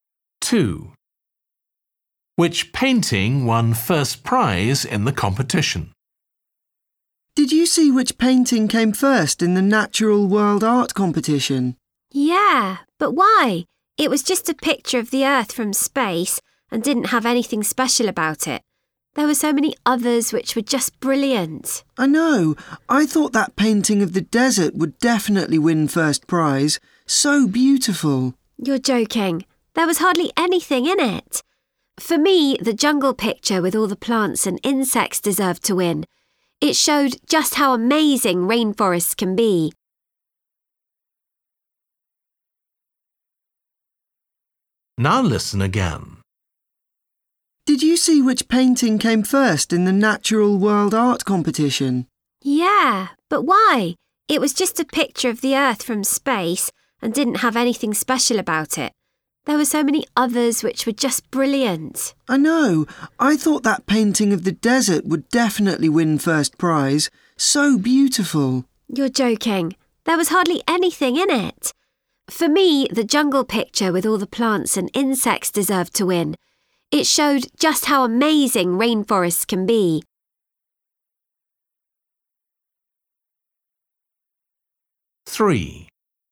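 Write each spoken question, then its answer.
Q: Which painting won first prize in the competition?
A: the picture of the Earth from space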